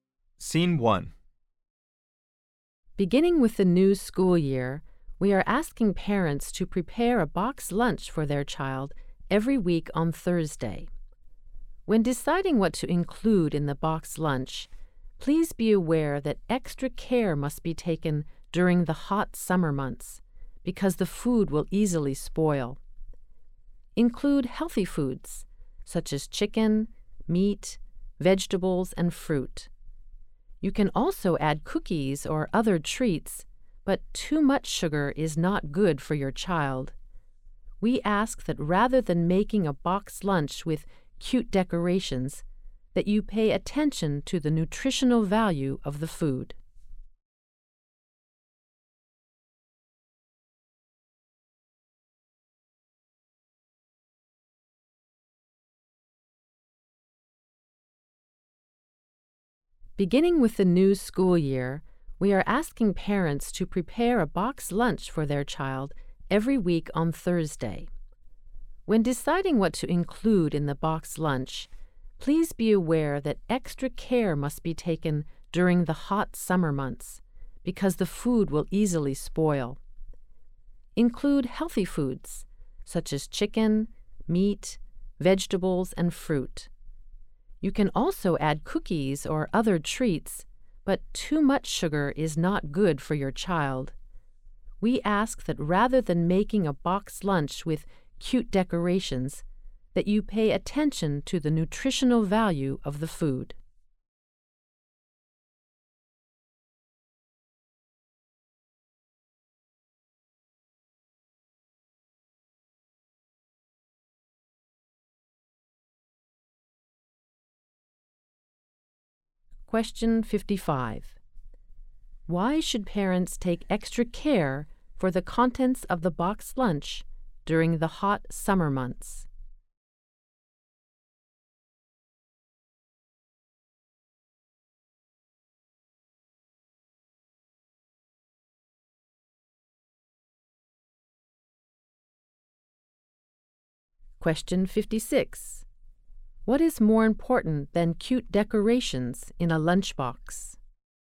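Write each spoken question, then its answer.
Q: Why should parents take extra care for the contents of the box lunch during the hot summer months?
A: Because the food will easily spoil.

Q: What is more important than cute decorations in a lunchbox?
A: The nutritional value of the food.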